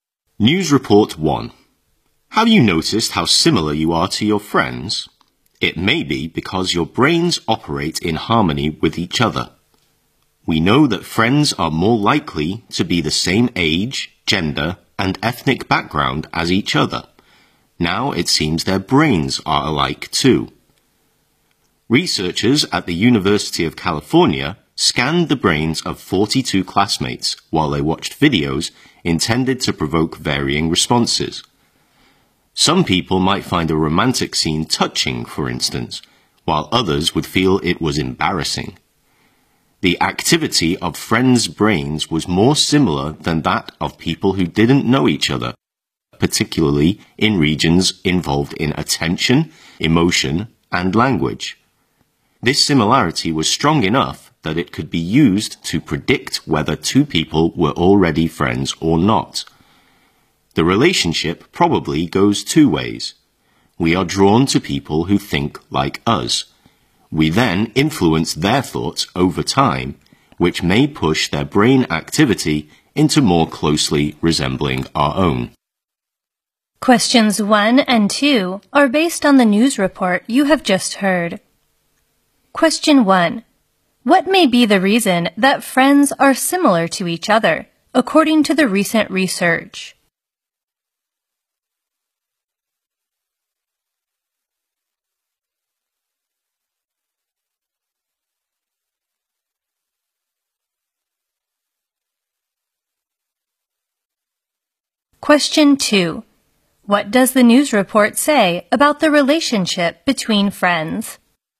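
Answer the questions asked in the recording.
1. Their brains work in harmony with each other.
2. It probably goes two ways: we're drawn to people who think like us, then we influence their thoughts.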